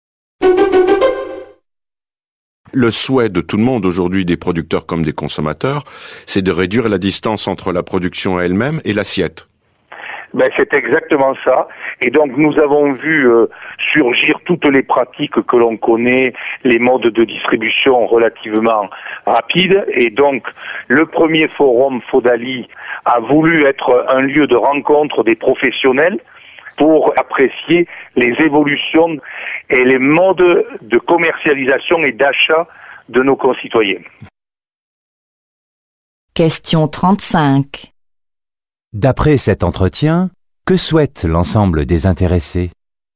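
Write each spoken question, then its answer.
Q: D'après cet entretien, que souhaite l'ensemble des intéressés?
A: Réduire la distance entre la production et l'assiette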